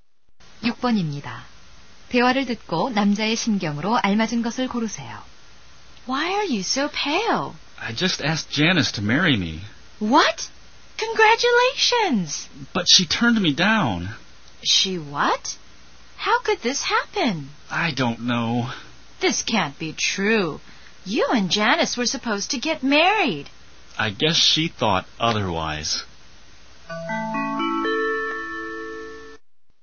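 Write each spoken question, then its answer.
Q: 대화를 듣고 남자의 심경으로 알맞은 것을 고르세요.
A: 실망함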